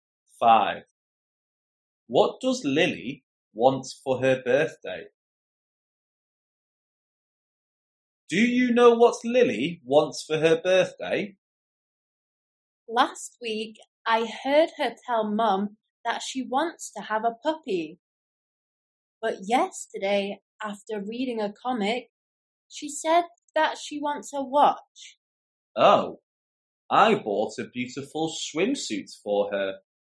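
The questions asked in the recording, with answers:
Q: What does Lily want for her birthday?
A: A watch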